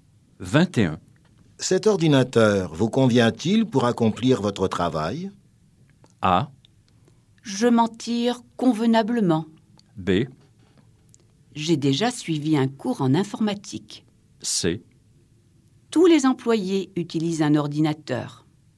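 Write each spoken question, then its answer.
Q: Cet ordinateur vous convient-il pour accomplir votre travail?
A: A: Je m'en tire convenablement.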